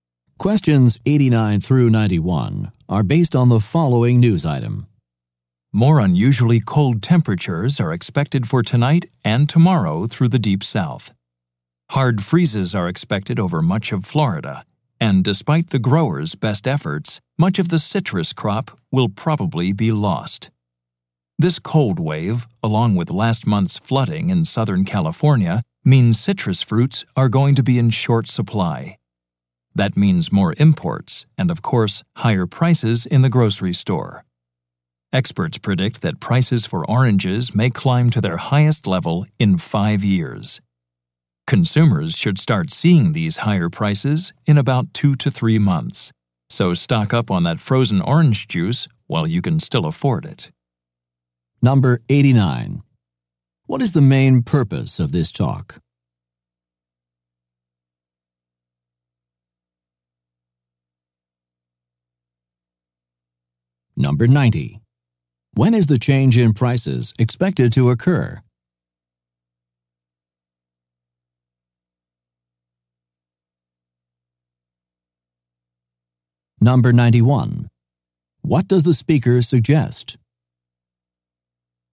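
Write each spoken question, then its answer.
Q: What is the main purpose of this talk?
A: To warn that citrus prices will rise

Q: When is the change in prices expected to occur?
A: In about 2 to 3 months

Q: What does the speaker suggest?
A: Stock up on frozen orange juice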